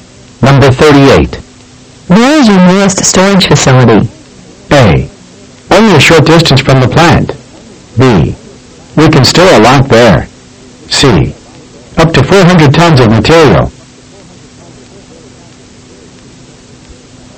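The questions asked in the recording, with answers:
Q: Where is your nearest storage facility?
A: A: Only a short distance from the plant.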